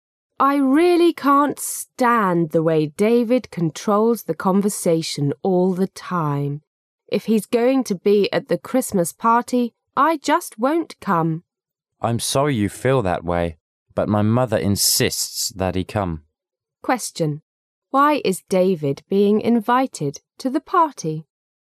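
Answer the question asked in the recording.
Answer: The speaker's mother insists that he come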